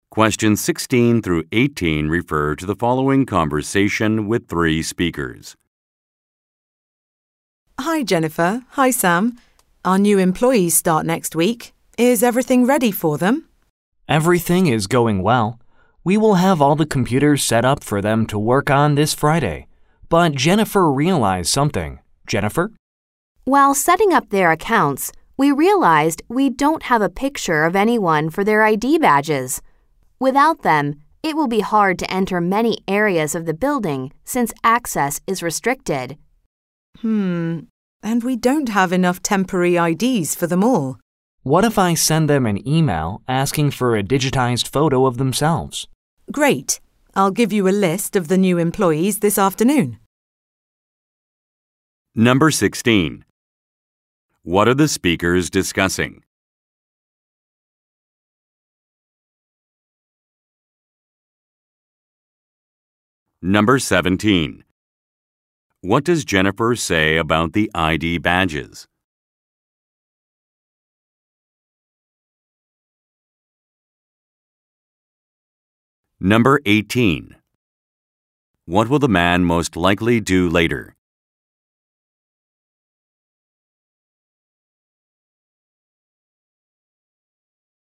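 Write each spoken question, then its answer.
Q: What are the speakers discussing?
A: Getting ready for new employees who start next week

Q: What does Jennifer say about the ID badges?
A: They don't have photos of the new employees for the badges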